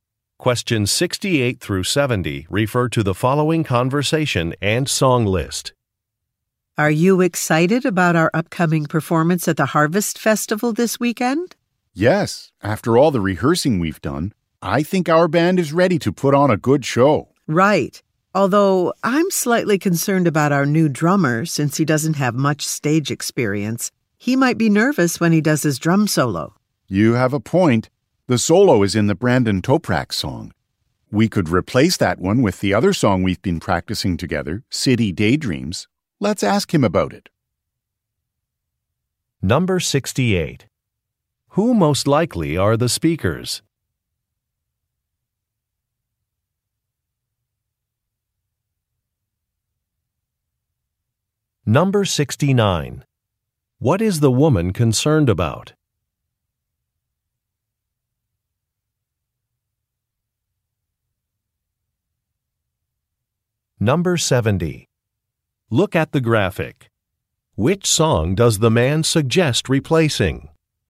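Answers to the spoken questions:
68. Band members
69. The new drummer may be nervous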